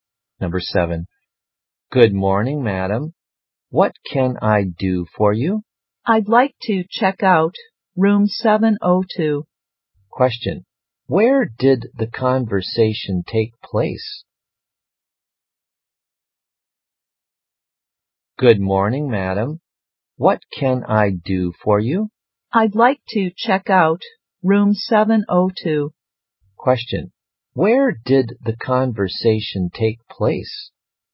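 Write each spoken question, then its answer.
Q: where did the conversation take place?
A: In a hotel.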